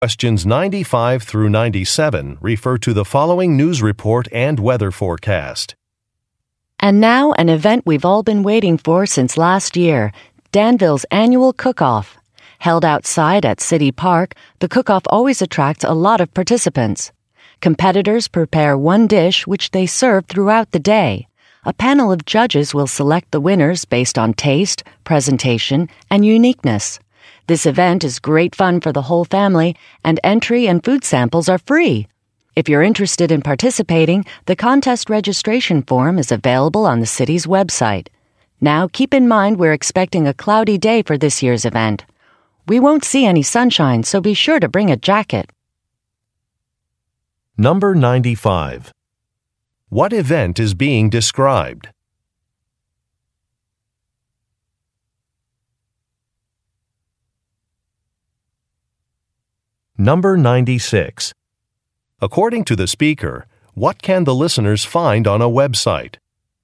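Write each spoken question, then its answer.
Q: What event is being described?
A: A cooking competition (Danville's annual cook-off)

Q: According to the speaker, what can the listeners find on a website?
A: A contest registration form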